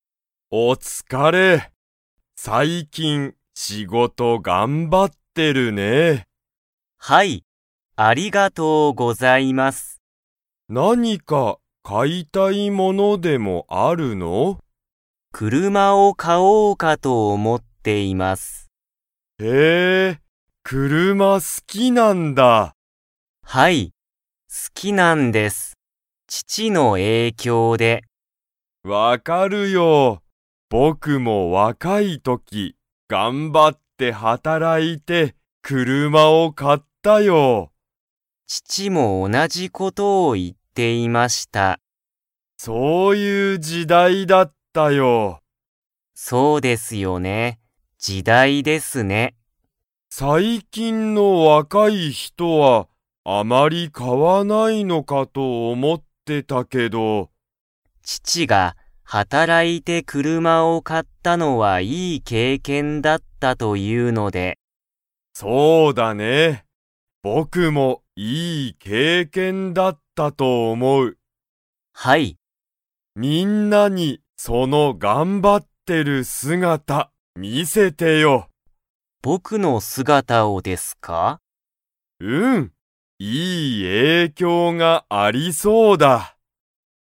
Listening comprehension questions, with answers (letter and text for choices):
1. ツトムは、____の影響(えいきょう)で、車(くるま)が好(す)き。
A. 友達ともだち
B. 先生せんせい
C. 母はは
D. 父ちち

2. 上司じょうしは、若わかい人ひとは車くるまを と思おもっていた。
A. 買かう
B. 買かわない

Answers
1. D. 父ちち
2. B. 買かわない

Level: Level 2